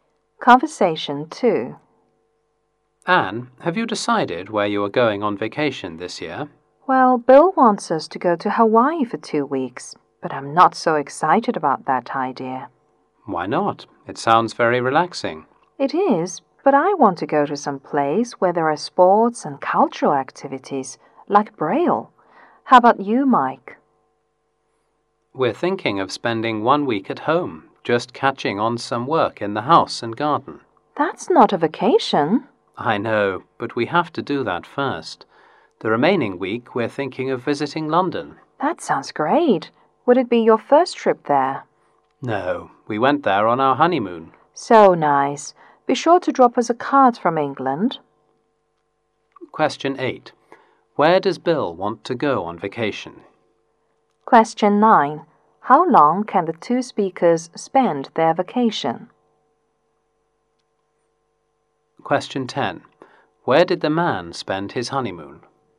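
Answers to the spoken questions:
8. Hawaii
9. Two weeks
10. London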